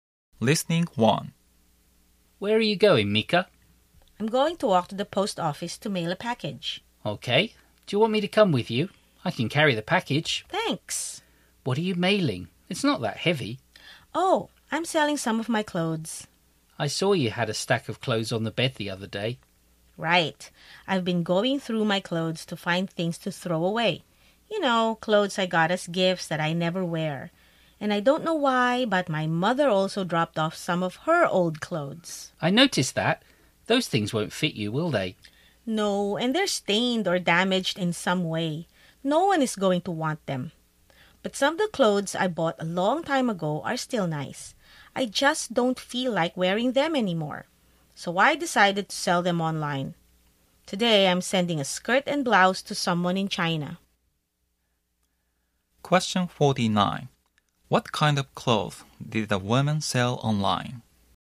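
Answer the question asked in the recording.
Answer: Old clothes she bought long ago but no longer wears (a skirt and blouse)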